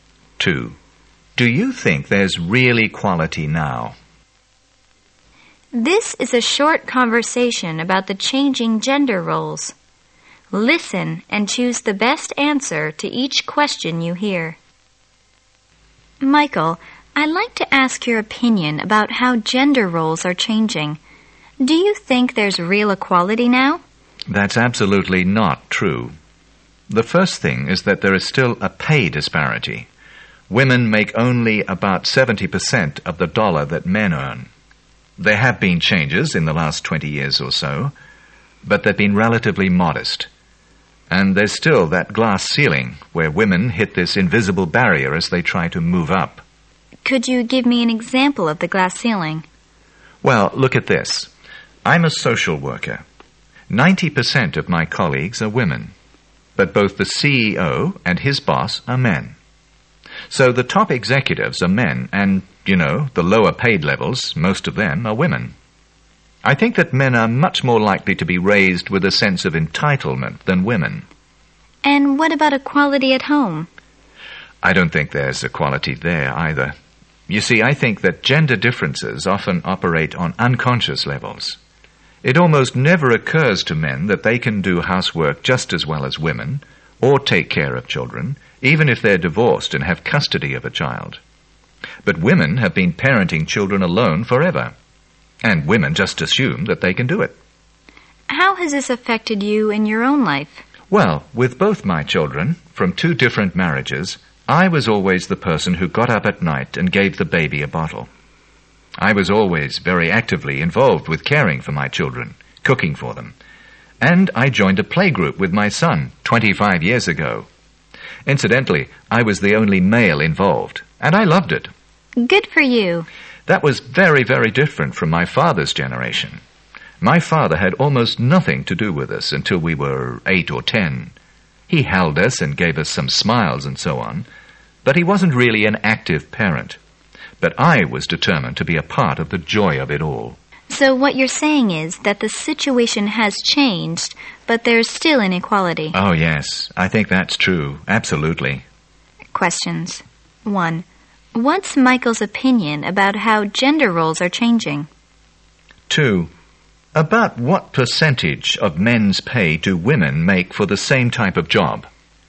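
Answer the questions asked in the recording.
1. They have changed, but there is still no real equality
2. About 70%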